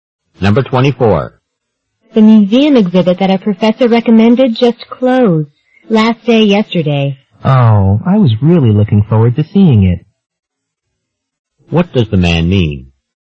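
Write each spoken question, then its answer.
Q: What does the man mean?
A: He is disappointed that he missed the exhibit.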